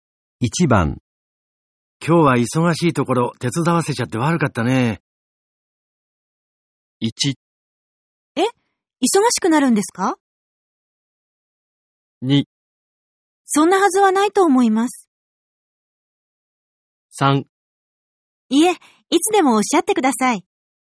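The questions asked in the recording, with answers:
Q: 今日は忙しいところ手伝わせちゃって悪かったね。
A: 3: いえ、いつでもおっしゃってください。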